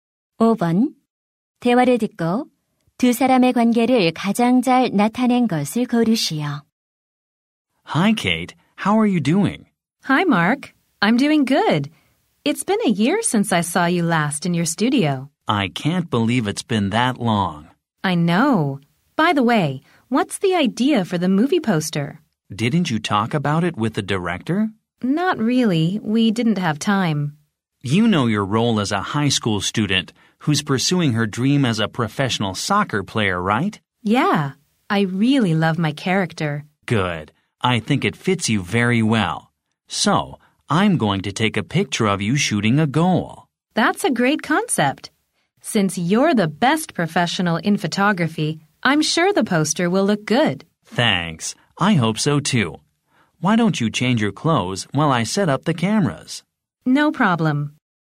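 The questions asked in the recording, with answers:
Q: 대화를 듣고 두 사람의 관계를 가장 잘 나타낸 것을 고르시오.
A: 배우와 사진작가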